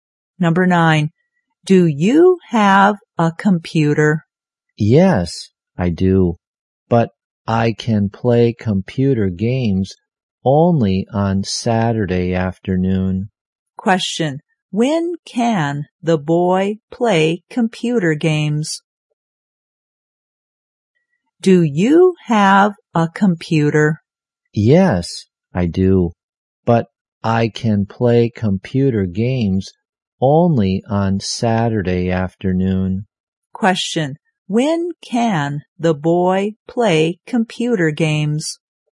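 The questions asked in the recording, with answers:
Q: When can the boy play computer games?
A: Only on Saturday afternoon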